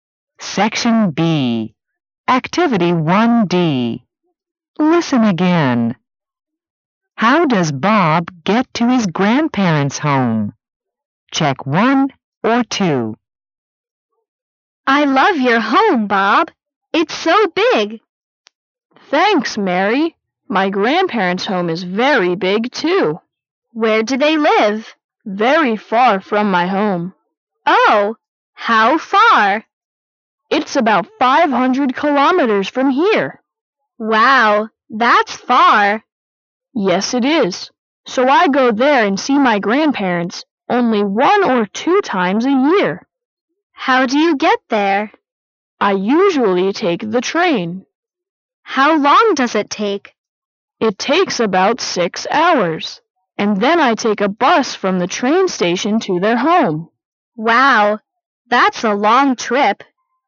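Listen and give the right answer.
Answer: He takes the train, then a bus from the train station.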